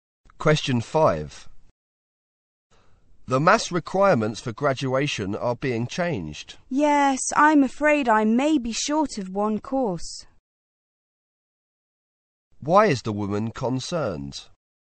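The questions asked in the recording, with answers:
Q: Why is the woman concerned?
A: She may be one maths course short for graduation.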